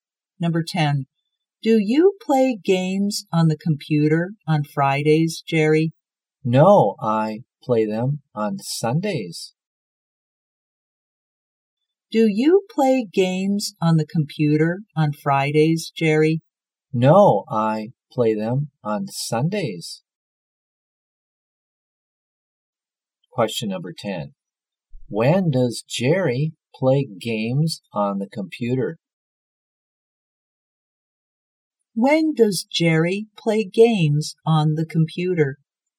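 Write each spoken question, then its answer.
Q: When does Jerry play games on the computer?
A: On Sundays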